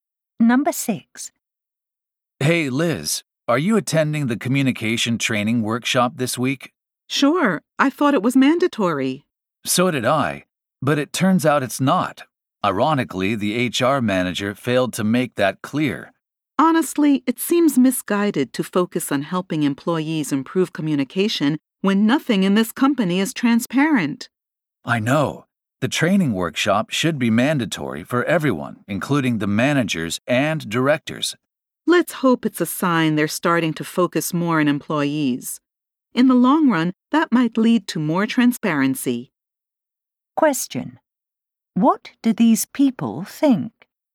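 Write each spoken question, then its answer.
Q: What do these people think?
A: The company lacks transparency, and managers and directors should also have to take the training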